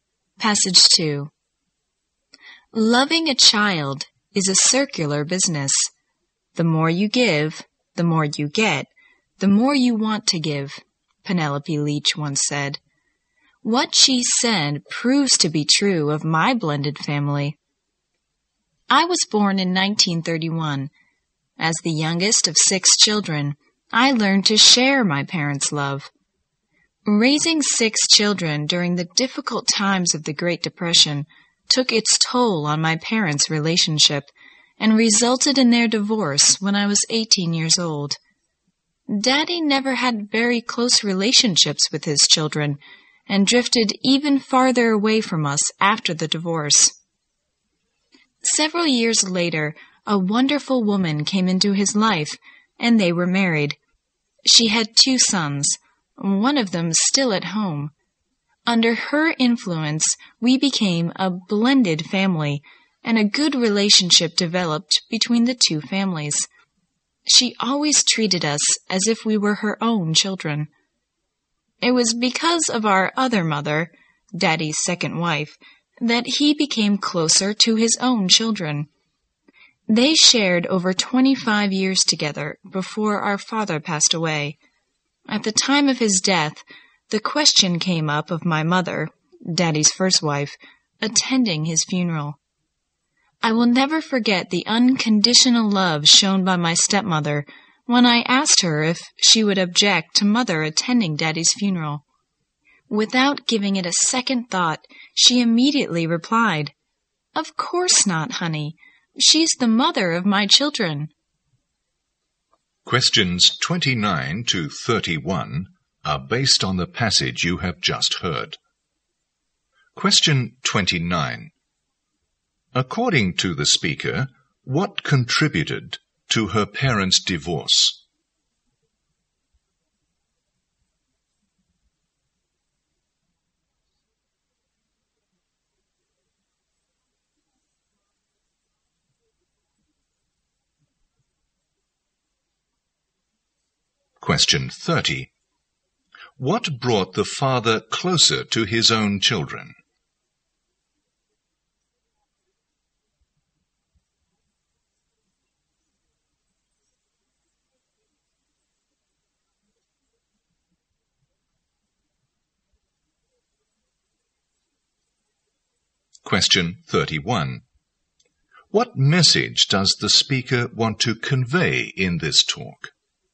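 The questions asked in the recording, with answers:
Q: According to the speaker, what contributed to her parents' divorce?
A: The stress of raising six children during the Great Depression

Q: What brought the father closer to his own children?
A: The influence of his second wife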